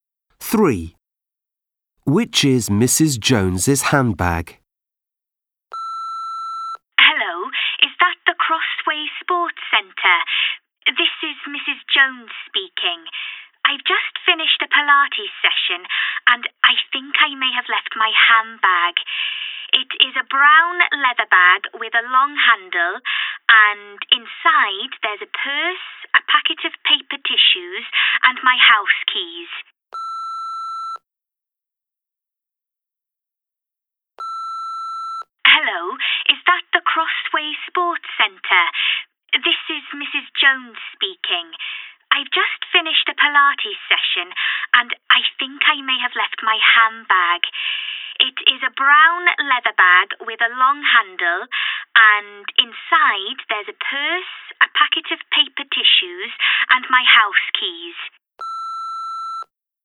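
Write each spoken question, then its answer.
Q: Which is Mrs. Jones's handbag?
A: The brown leather bag with a long handle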